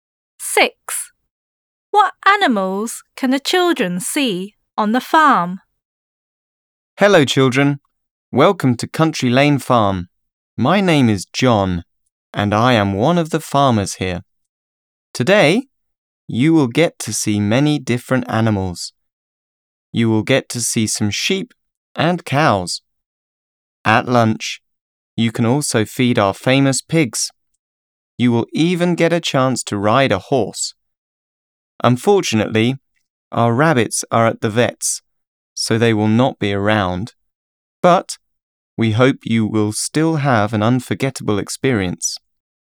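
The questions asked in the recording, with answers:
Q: What animals can the children see on the farm?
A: Sheep, cows, pigs and horses (not rabbits)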